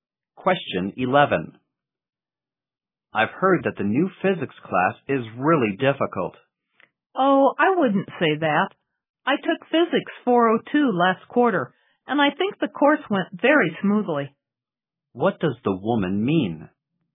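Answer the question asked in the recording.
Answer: The physics class is not really difficult.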